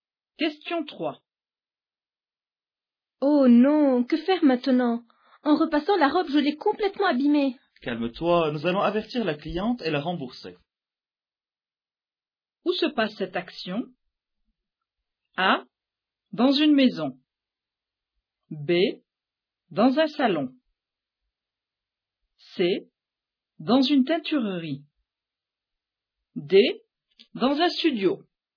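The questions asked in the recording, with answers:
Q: Où se passe cette action?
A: C: Dans une teinturerie.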